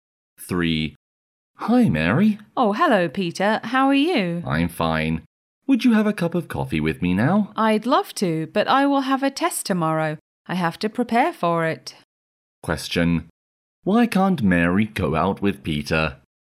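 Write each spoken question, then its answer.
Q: Why can't Mary go out with Peter?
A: She has to prepare for a test tomorrow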